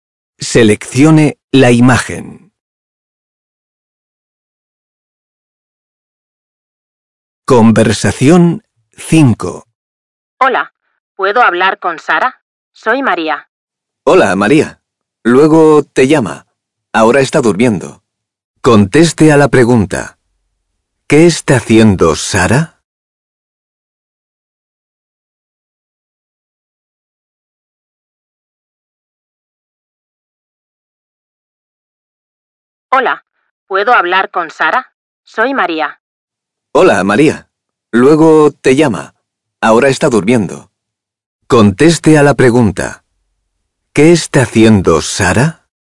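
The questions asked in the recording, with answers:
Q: ¿Qué está haciendo Sara?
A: Está durmiendo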